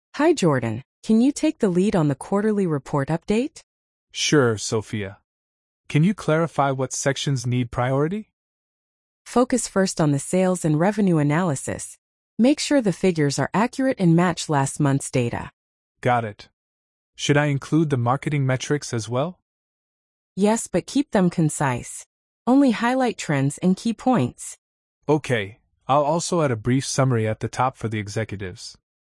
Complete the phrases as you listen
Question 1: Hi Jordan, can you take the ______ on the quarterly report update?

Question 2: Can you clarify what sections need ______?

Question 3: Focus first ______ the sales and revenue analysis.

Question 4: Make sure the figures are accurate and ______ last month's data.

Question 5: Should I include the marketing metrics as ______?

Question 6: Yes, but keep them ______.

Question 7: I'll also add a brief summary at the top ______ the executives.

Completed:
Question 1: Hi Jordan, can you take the lead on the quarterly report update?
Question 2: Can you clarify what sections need priority?
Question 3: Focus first on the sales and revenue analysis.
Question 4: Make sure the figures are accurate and match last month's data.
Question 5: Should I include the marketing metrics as well?
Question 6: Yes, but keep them concise.
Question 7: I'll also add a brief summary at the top for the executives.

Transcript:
Sophia: Hi Jordan, can you take the lead on the quarterly report update?
Jordan: Sure, Sophia. Can you clarify what sections need priority?
Sophia: Focus first on the sales and revenue analysis. Make sure the figures are accurate and match last month's data.
Jordan: Got it. Should I include the marketing metrics as well?
Sophia: Yes, but keep them concise. Only highlight trends and key points.
Jordan: Okay, I'll also add a brief summary at the top for the executives.
Perfect! "I'll also add a brief summary at the top for the executives."